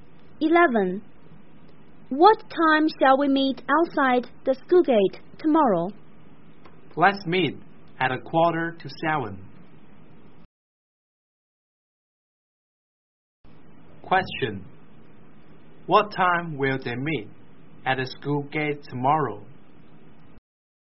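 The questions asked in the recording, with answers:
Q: What time will they meet at the school gate tomorrow?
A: At 6:45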